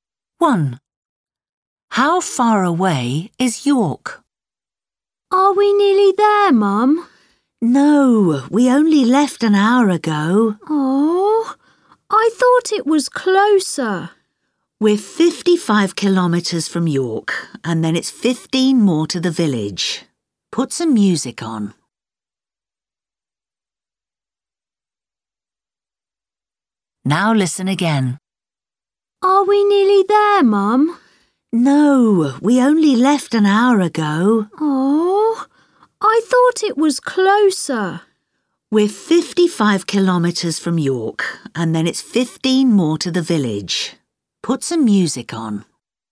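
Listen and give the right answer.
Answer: 55 kilometres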